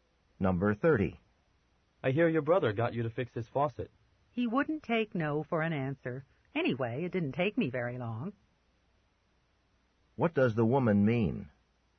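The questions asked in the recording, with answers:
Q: What does the woman mean?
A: Her brother insisted, but fixing the faucet was quick.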